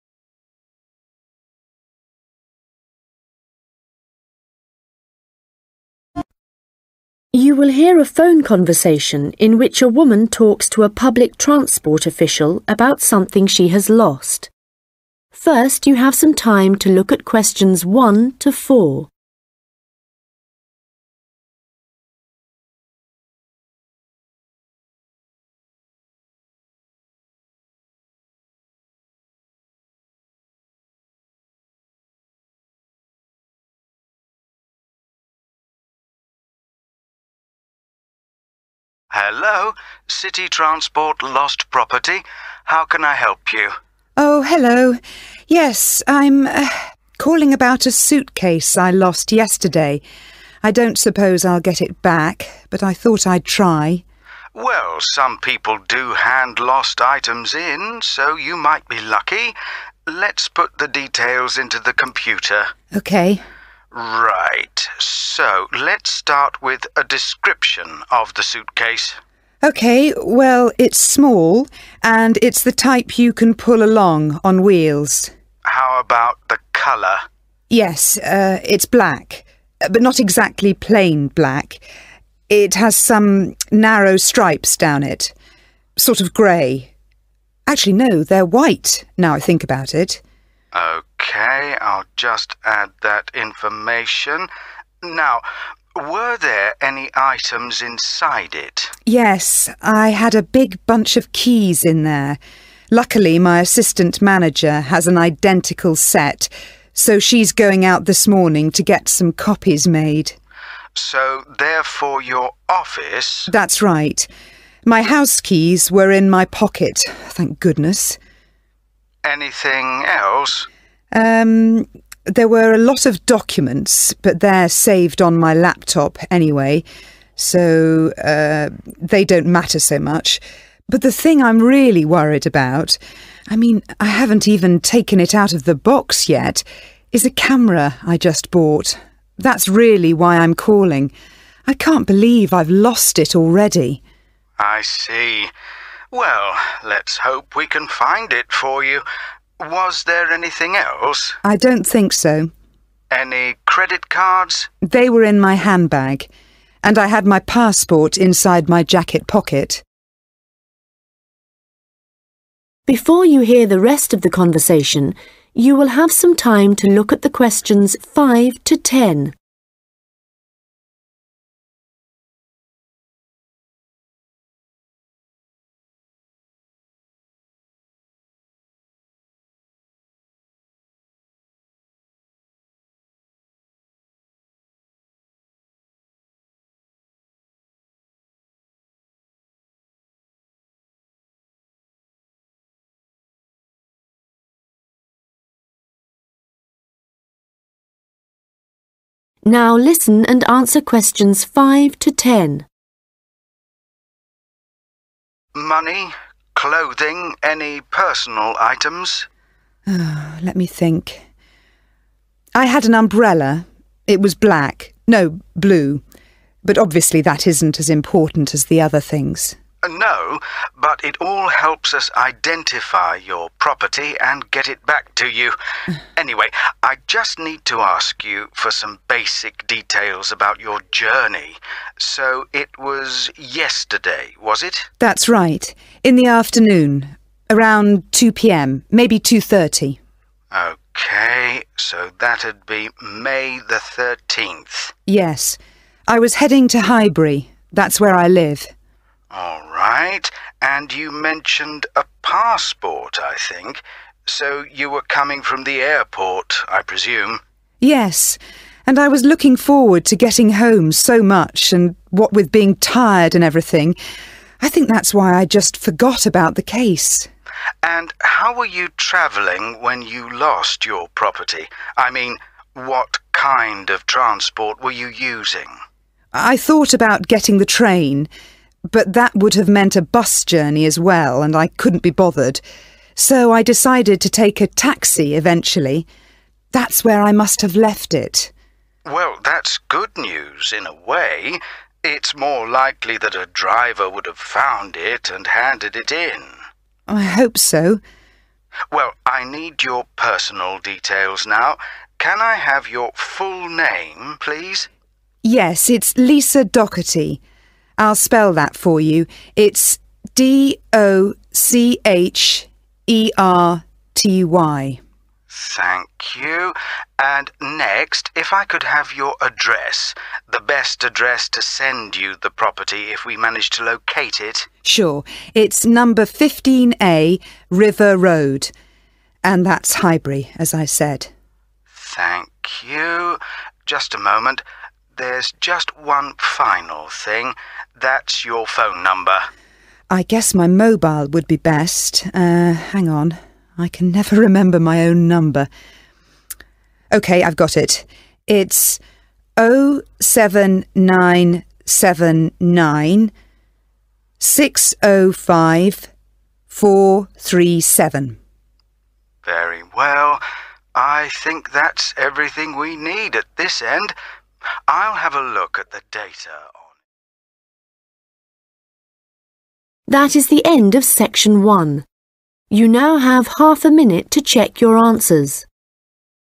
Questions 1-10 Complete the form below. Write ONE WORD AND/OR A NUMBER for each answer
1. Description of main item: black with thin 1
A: white

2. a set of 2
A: office

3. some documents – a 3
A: camera

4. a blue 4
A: umbrella

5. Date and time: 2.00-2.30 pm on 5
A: 13th May

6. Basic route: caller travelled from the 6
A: airport

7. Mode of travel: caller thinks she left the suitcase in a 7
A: taxi

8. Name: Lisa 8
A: Docherty

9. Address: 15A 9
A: River

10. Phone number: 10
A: 07979605437

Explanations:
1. Yes – it's black but not exactly plain black – it has some narrow stripes down it, sort of grey. Actually – no, they're white now I think about it [Vâng – nó có màu đen nhưng không hoàn toàn là đen tuyền – có một số sọc hẹp dọc theo nó, màu hơi xám. Trên thực tế – không phải vậy đâu, bây giờ tôi nghĩ nó màu trắng cơ].
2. So, they're for your office? [Vậy đó là cho văn phòng của bạn à?]
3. I mean, I haven't even taken it out of the box yet – is a camera I just bought [Ý tôi là, tôi thậm chí còn chưa lấy nó ra khỏi hộp – là một chiếc máy ảnh tôi mới mua].
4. I had an umbrella. It was black, no, blue, but obviously, that isn't as important as the other things [Tôi đã có một chiếc ô. Nó màu đen, không, màu xanh lam chứ, nhưng rõ ràng là nó không quan trọng bằng những thứ khác].

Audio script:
Staff member: Hello. City Transport Lost Property. How can I help you?
Woman: Oh, hello, Yes, I'm, er, calling about a suitcase I lost yesterday, I don't suppose I'll get it back but I thought I'd try.
Staff member: Well, some people do hand lost items in so you might be lucky. Let's put the details into the computer.
Woman: OK.
Staff member: Right, so, let's start with a description of the suitcase.
Woman: OK, well, it's small, and it's the type you can pull along on wheels.
Staff member: How about the colour?
Woman: (Q1) Yes – it's black but not exactly plain black – it has some narrow stripes down it, sort of grey.
Staff member: OK, I'll just add that information. Now were there any items inside it?
Woman: Yes. I had a big bunch of keys in there. Luckily my assistant manager has an identical set so she's going out this morning to get some copies made.
Staff member: (Q2) So, they're for your office?
Woman: That's right. My house keys were in my pocket, thank goodness.
Staff member: Anything else?
Woman: Um, there were a lot of documents, but they're saved on my laptop anyway, so they don't matter so much. That's really why I'm calling. I can't believe I've lost it already.
Staff member: I see. Well, let's hope we can find it for you. Was there anything else?
Woman: I don't think so.
Staff member: Any credit cards?
Woman: They were in my handbag. And I had my passport inside my jacket pocket.
Staff member: Money, clothing, any personal items?
Woman: Oh, let me think. (Q4) I had an umbrella. It was black, no, blue, but obviously, that isn't as important as the other things [Tôi đã có một chiếc ô.
Staff member: No, but it all helps us identify your property and get it back to you. Anyway, I just need to ask you for some basic details about your journey. So it was yesterday, was it?
Woman: That's right. In the afternoon – around 2 pm, maybe 2.30.
Woman: Yes. I was heading to Highbury. That's where I live.
Staff member: All right, and you mentioned a passport, I think.
Woman: Yes – and I was looking forward to getting home so much – and what with being tired and everything – I think that's why I just forgot about the case.
Staff member: And how were you travelling when you lost your property? I mean, what kind of transport were you using?
Woman: (Q7) I thought about getting the train, but that would have meant a bus journey as well, and I couldn't be bothered so I decided to take a taxi eventually.
Staff member: Well, that's good news in a way. It's more likely that a driver would have found it and handed it in.
Woman: I hope so.
Staff member: Well, I need your personal details now. Can I have your full name, please?
I'll spell that for you. It's D-O-C-H-E-R-T-Y.
Staff member: Thank you. And next, if I could have your address – the best address to send you the property if we manage to locate it?
It's number 15A River Road – and that's Highbury, as I said [Chắc chắn rồi.
Staff member: Thank you. Just a moment. There's just one final thing – that's your phone number.
Woman: I guess my mobile would be best. Er, hang on, I can never remember my own number. OK, I've got it.
Staff member: Very well. I think that's everything we need at this end, I'll have a look at the data on...